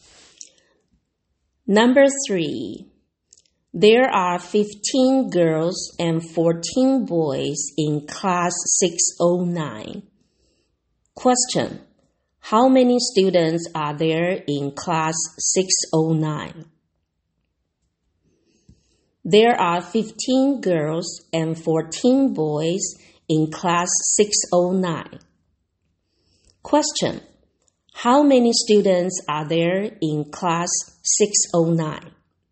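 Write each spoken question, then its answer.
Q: how many students are there in class 609?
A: 29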